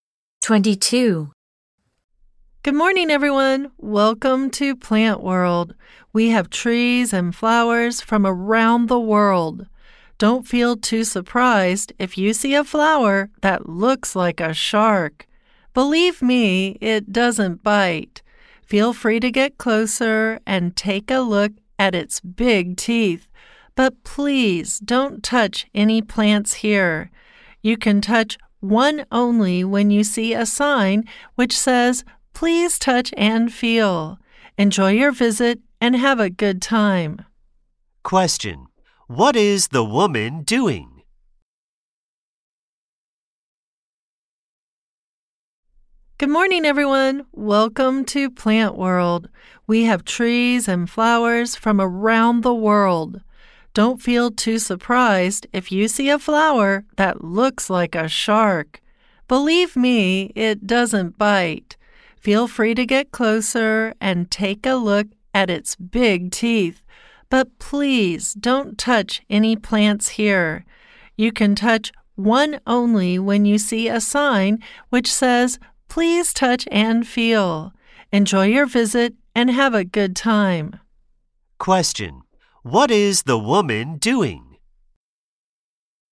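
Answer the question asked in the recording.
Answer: Welcoming visitors and guiding them at Plant World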